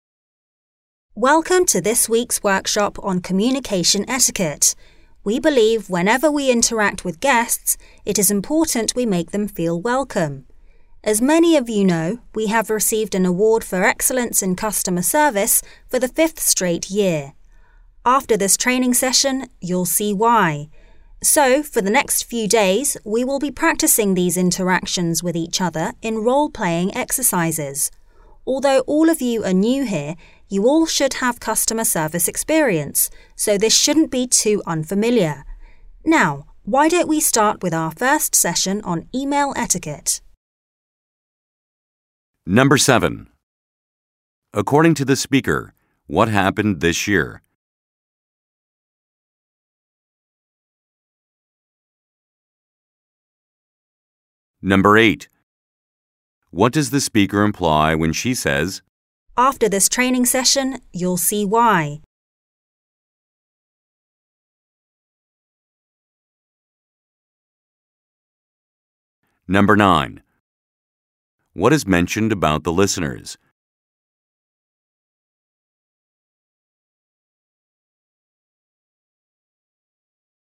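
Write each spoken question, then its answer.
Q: According to the speaker, what happened this year?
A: The company received an award for excellence in customer service for the 5th straight year.

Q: What is mentioned about the listeners?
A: They are all new but have customer service experience.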